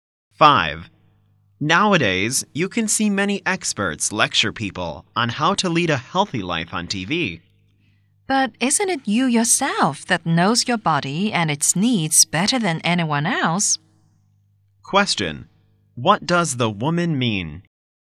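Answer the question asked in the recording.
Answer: You know your own body best, better than TV experts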